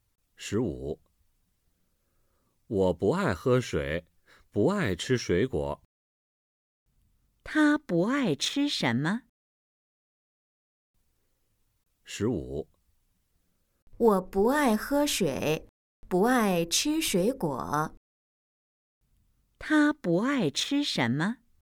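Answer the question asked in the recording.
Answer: 水果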